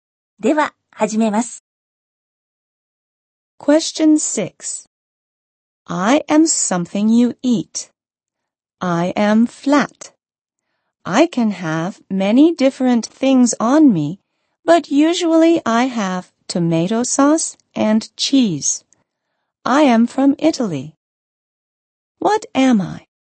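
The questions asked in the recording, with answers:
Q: What am I?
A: Pizza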